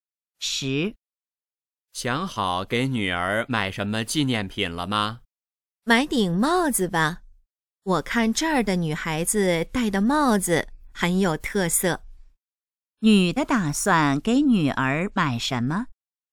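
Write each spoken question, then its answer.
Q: 女的打算给女儿买什么?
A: 帽子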